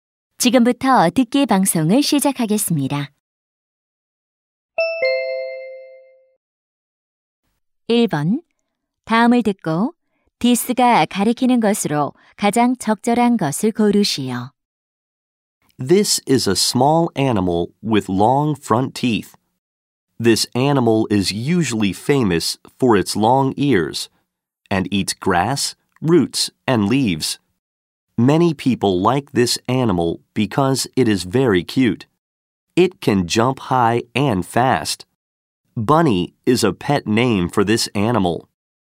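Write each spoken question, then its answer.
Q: 다음을 듣고 디스가 가리키는 것으로 가장 적절한 것을 고르시오.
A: 토끼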